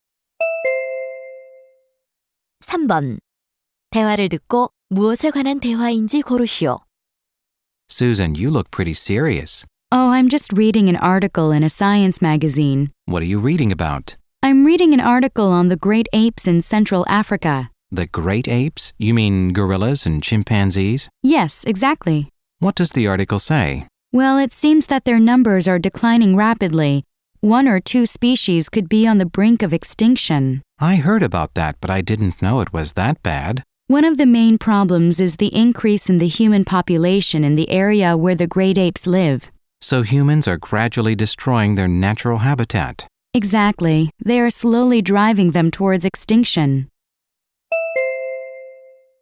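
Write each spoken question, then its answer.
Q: 대화를 듣고 무엇에 관한 대화인지 고르시오.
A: 중앙아프리카 유인원의 멸종 위기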